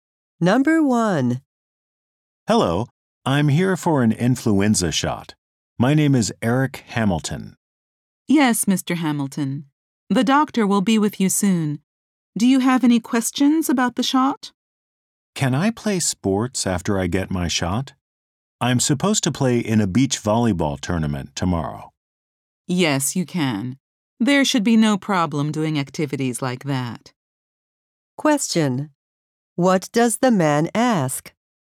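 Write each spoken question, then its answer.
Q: What does the man ask?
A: Whether he can play sports after getting his flu shot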